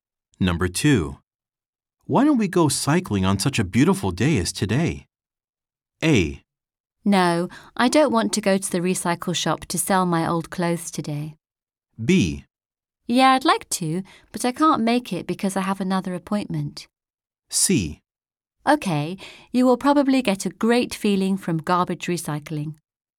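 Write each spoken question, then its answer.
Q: Why don't we go cycling on such a beautiful day as today?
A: B: Yeah, I'd like to, but I can't make it because I have another appointment.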